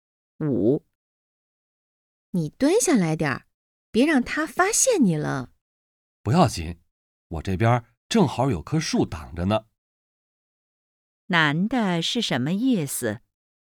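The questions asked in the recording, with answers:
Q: 男的是什么意思?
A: 有树挡着,不会被发现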